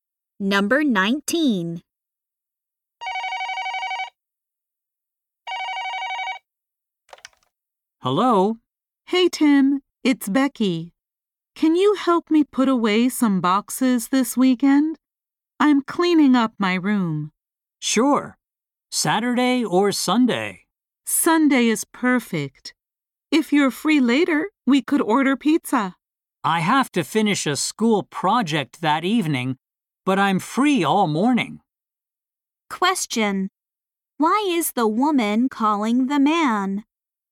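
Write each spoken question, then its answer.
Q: Why is the woman calling the man?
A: To ask him to help her put away some boxes this weekend.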